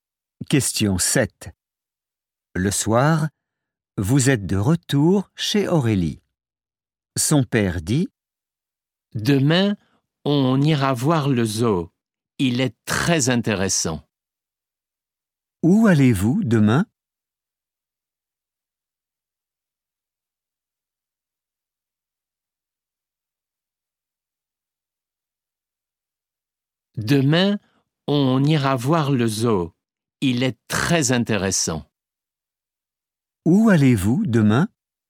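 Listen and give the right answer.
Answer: Au zoo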